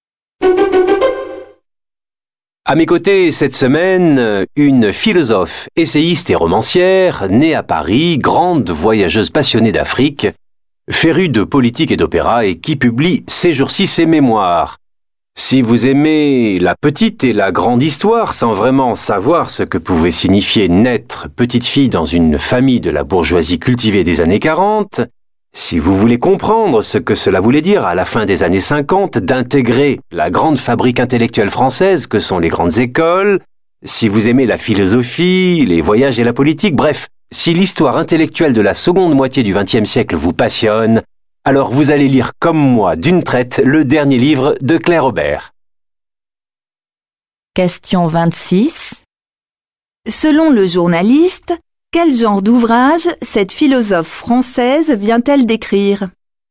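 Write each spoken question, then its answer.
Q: Selon le journaliste, quel genre d'ouvrage cette philosophe française vient-elle d'écrire?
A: Ses mémoires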